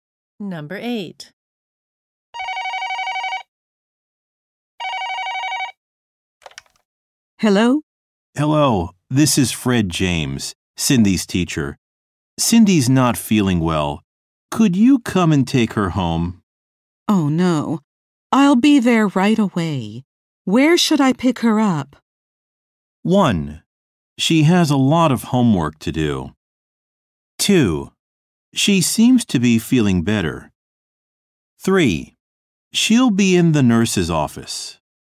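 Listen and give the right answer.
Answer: 3: She'll be in the nurse's office.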